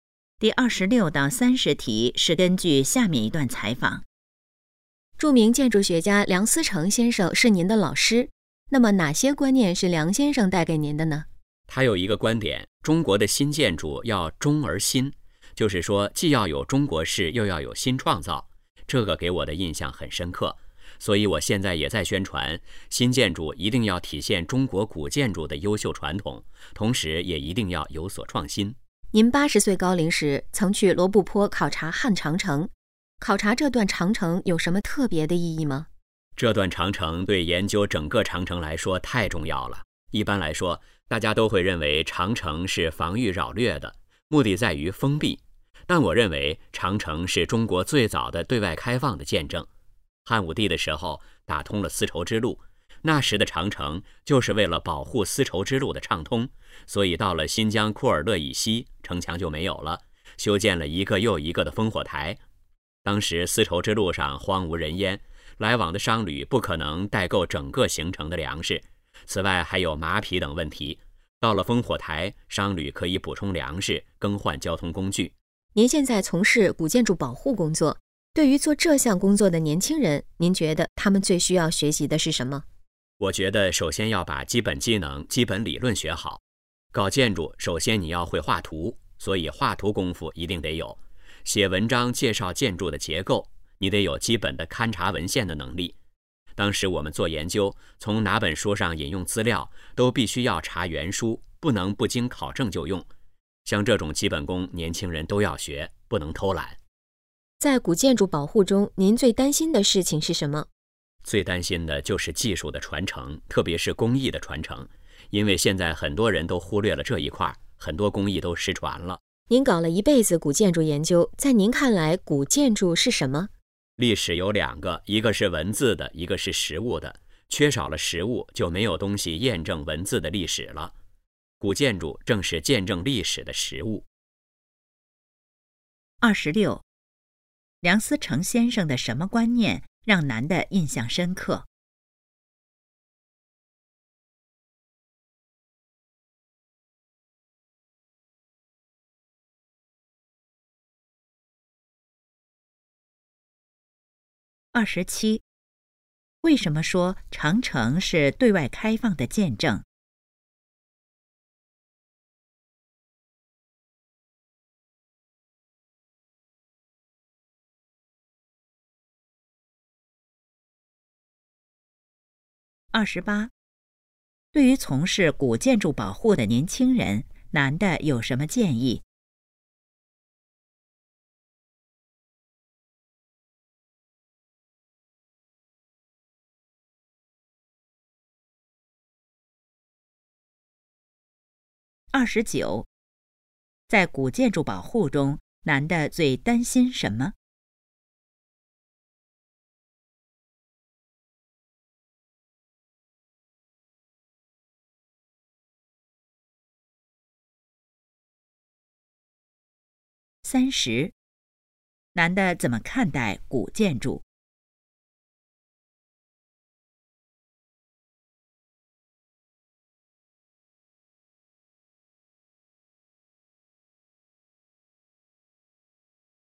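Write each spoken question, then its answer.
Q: 梁思成先生的什么观念让男的印象深刻?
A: 新建筑要中而新

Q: 为什么说长城是对外开放的见证?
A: 汉长城是为了保护丝绸之路的畅通

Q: 对于从事古建筑保护的年轻人,男的有什么建议?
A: 学好基本技能和基本理论

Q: 在古建筑保护中,男的最担心什么?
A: 技术和工艺的传承

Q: 男的怎么看待古建筑?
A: 是见证历史的实物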